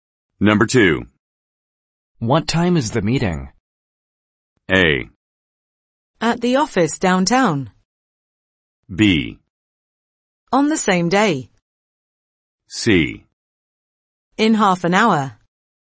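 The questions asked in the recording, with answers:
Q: What time is the meeting?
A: C: In half an hour.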